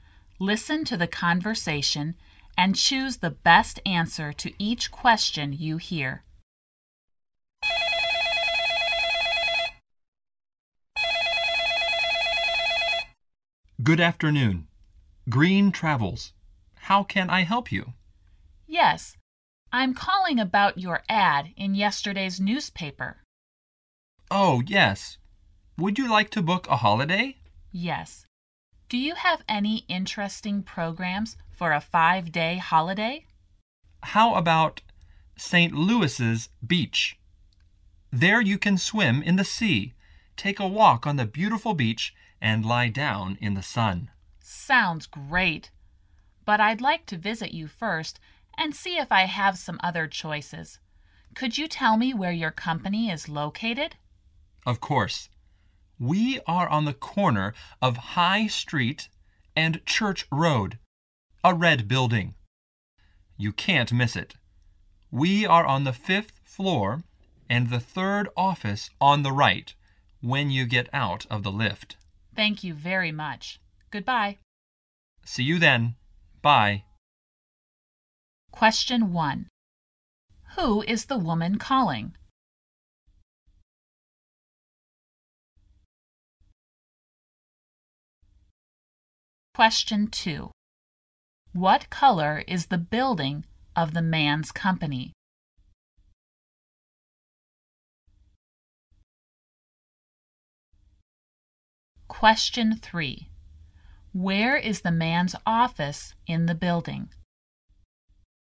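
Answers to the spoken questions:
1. A travel agency (Green Travels)
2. Red
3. On the 5th floor, the 3rd office on the right from the lift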